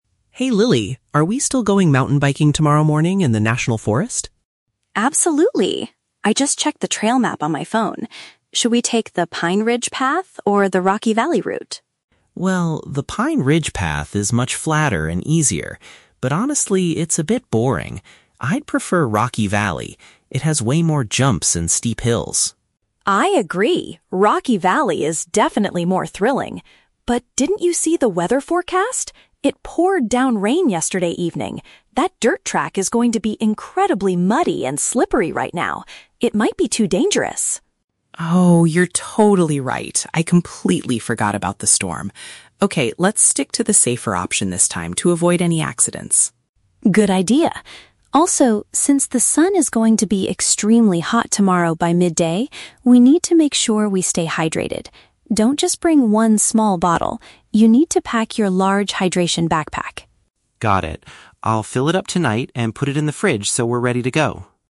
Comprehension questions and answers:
Listen to the conversation between a brother and sister planning a trip. Choose the correct answer (A, B, or C) for each question.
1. Why does Mark initially prefer the Rocky Valley route?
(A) Because it is much flatter and easier to ride on.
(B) Because it offers a more challenging and exciting experience.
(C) Because it is the only path currently open in the national forest.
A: (B) Because it offers a more challenging and exciting experience.

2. Why do they eventually decide NOT to take the Rocky Valley route?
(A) Heavy rain has made the ground too hazardous for biking.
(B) Mark injured his bicycle during a bad storm yesterday.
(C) The forest rangers closed that specific area for maintenance.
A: (A) Heavy rain has made the ground too hazardous for biking.

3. What does Lily strongly advise Mark to do for the trip?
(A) To wear a heavy jacket to protect his clothes from the mud.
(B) To freeze his water bottles overnight to keep them cold.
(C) To bring extra liquid because of the high temperatures.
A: (C) To bring extra liquid because of the high temperatures.

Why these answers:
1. Mark says he prefers Rocky Valley because it has "way more jumps and steep hills" and Lily agrees it is "more thrilling." This matches option B: a more challenging and exciting experience. Why the traps are wrong: Option A is a trap; being "flatter and easier" describes the other path (Pine Ridge), which Mark thinks is boring. Option C is never mentioned.
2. Lily reminds Mark that it "poured down rain" and the track will be "muddy and slippery" and "too dangerous." Option A paraphrases this perfectly by saying heavy rain made it "too hazardo

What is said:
Mark: Hey Lily, are we still going mountain biking tomorrow morning in the national forest?
Lily: Absolutely! I just checked the trail map on my phone. Should we take the Pine Ridge path or the Rocky Valley route?
Mark: Well, the Pine Ridge path is much flatter and easier, but honestly, it's a bit boring. I'd prefer Rocky Valley. It has way more jumps and steep hills.
Lily: I agree, Rocky Valley is definitely more thrilling. But didn't you see the weather forecast? It poured down rain yesterday evening. That dirt track is going to be incredibly muddy and slippery right now. It might be too dangerous.
Mark: Oh, you're totally right. I completely forgot about the storm. Okay, let's stick to the safer option this time to avoid any accidents.
Lily: Good idea. Also, since the sun is going to be extremely hot tomorrow by midday, we need to make sure we stay hydrated. Don't just bring one small bottle; you need to pack your large hydration backpack.
Mark: Got it. I'll fill it up tonight and put it in the fridge so we're ready to go.

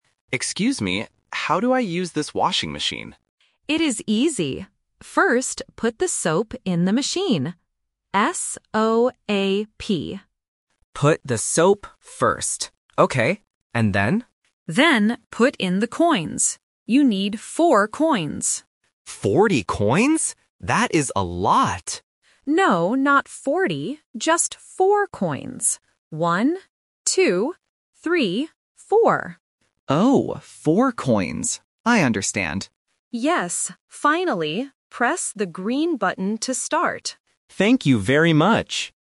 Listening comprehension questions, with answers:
Listen to the conversation and choose the correct answer (A, B, or C).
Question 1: What word does the owner spell?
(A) C-O-I-N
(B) S-O-A-P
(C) G-R-E-E-N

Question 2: How many coins does the customer need?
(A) 4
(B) 14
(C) 40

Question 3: What color is the start button?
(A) Red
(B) Green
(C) Blue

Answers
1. (B) S-O-A-P
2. (A) 4
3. (B) Green

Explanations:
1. The owner tells the customer to put the soap in first and spells the word: "S-O-A-P".
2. The owner clearly says, "You need 4 coins," and counts "One, two, three, four."
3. The owner says, "press the green button to start."

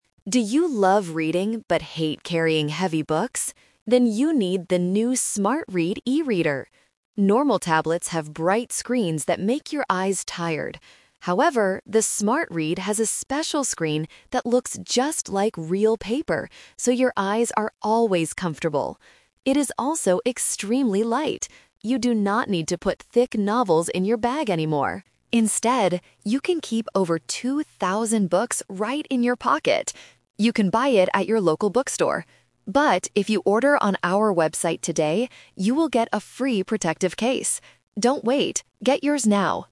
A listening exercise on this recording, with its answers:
Listen to an advertisement for a new e-reader. Choose the correct answer A, B, or C.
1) Why is the Smart-Read better than a normal tablet?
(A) It has a very bright screen.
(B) It does not make your eyes tired.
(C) It is much cheaper to buy.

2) Where can you keep the Smart-Read?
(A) In a thick novel.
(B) In a heavy bag.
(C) In your pocket.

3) What happens if you order the e-reader on the website today?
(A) You will get two thousand books for free.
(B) You will receive a free protective case.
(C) You have to go to the local bookstore.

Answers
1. (B) It does not make your eyes tired.
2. (C) In your pocket.
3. (B) You will receive a free protective case.

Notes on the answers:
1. The announcer says the screen "looks just like real paper, so your eyes are always comfortable." Trap: Option A is a trap because a "bright screen" is what normal tablets have, which makes eyes tired. Option C is a logical guess but price is not mentioned in the audio.
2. The announcer says, "Instead, you can keep over two thousand books right in your pocket!" Trap: Option B (heavy bag) is a trap using negative instruction ("You do not need to put thick novels in your bag anymore"). Option A is just a mix of keywords from the audio.
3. The announcer clearly states, "if you order on our website today, you will get a free protective case." Trap: Option A is a trap using the number "two thousand" (which is the number of books the device can hold, not a free gift). Option C is a trap because the bookstore is an alternative place to buy, but you only get the free gift if you buy on the website.

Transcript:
Announcer: Do you love reading but hate carrying heavy books? Then you need the new "Smart-Read" e-reader! Normal tablets have bright screens that make your eyes tired. However, the Smart-Read has a special screen that looks just like real paper, so your eyes are always comfortable. It is also extremely light. You do not need to put thick novels in your bag anymore. Instead, you can keep over two thousand books right in your pocket! You can buy it at your local bookstore. But, if you order on our website today, you will get a free protective case. Don't wait, get yours now!

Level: A2

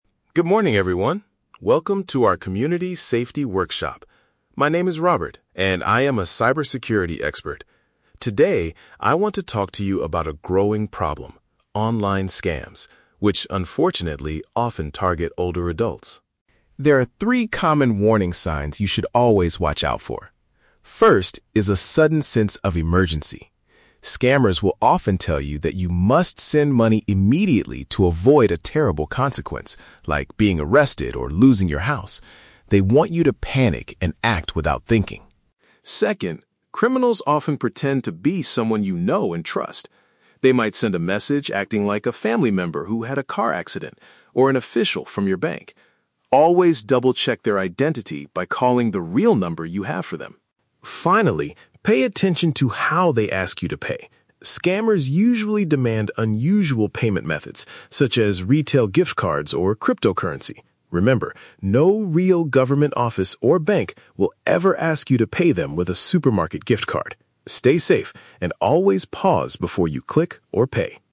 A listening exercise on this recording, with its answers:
Listen to a presentation from a cybersecurity expert and choose the correct answer (A, B, or C) for each question.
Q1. What is the first warning sign mentioned by the expert?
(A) Scammers send you a lot of retail gift cards.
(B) Scammers force you to make decisions very quickly.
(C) Scammers threaten to steal your computer password.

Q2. How do scammers use the trust of their victims?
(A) By claiming they are a relative or a bank worker.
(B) By visiting the victims at their own houses.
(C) By calling them from a real government office.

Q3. What does the speaker say about payment methods?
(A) Scammers prefer to use normal bank transfers.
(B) Older adults should only use credit cards online.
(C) Criminals request money in strange, untraditional forms.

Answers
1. (B) Scammers force you to make decisions very quickly.
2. (A) By claiming they are a relative or a bank worker.
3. (C) Criminals request money in strange, untraditional forms.

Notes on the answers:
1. The Key: Robert says scammers create a "sudden sense of emergency" and want you to "panic and act without thinking." Acting without thinking means making decisions very quickly. The Trap (A): The speaker mentions "gift cards" later in the talk, but scammers ask you to buy them, they don't send them to you. Plausible but not mentioned (C): Stealing passwords is a real cyber threat, but Robert does not mention this specific threat in his speech.
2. The Key: The expert explains that criminals "pretend to be... a family member... or an official from your bank." This means they claim to be a relative or a bank worker. The Trap (B): Robert mentions that scammers might threaten that you will be "losing your house," but they do not visit the victims at their houses. The Trap (C): The audio mentions a "government office," but Robert explicitly states that "no real government office" will ask you to pay like this.
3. The Key: The speaker warns that scammers demand "unusual payment methods, such as retail gift cards or cryptocurrency." Unusual methods mean strange, untraditional forms of money. The Trap (A): Scammers do not want normal bank transfers because they are easy for the police to trace. They want "unusual" methods. Plausible but not mentioned (B): Advising people to use credit cards online is a good safety tip, but the expert does not give this specific advice.

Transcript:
Robert: Good morning, everyone. Welcome to our community safety workshop. My name is Robert, and I am a cybersecurity expert. Today, I want to talk to you about a growing problem: online scams, which unfortunately often target older adults.
There are three common warning signs you should always watch out for. First is a sudden sense of emergency. Scammers will often tell you that you must send money immediately to avoid a terrible consequence, like being arrested or losing your house. They want you to panic and act without thinking.
Second, criminals often pretend to be someone you know and trust. They might send a message acting like a family member who had a car accident, or an official from your bank. Always double-check their identity by calling the real number you have for them.
Finally, pay attention to how they ask you to pay. Scammers usually demand unusual payment methods, such as retail gift cards or cryptocurrency. Remember, no real government office or bank will ever ask you to pay them with a supermarket gift card. Stay safe, and always pause before you click or pay.

